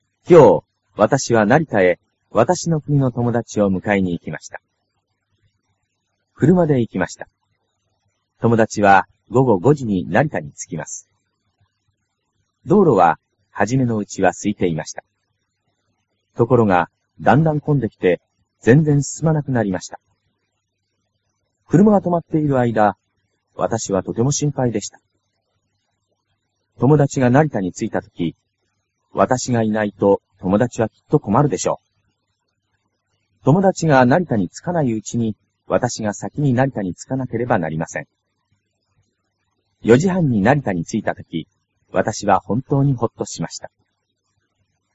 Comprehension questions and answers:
ひらがなで書いてください。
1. 道路は.............................すいていました。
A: はじめのうちは

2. .............................、わたしはとても心配でした。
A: くるまがとまっているあいだ

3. 友達が.............................、わたしがいないと友達はきっとこまるでしょう。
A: なりたについたとき

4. 友達が成田に.............................、わたしがさきに成田に着かなければなりません。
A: つかないうちに

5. .............................、わたしは本当にほっとしました。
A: 4じはんになりたについたとき

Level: cơ bản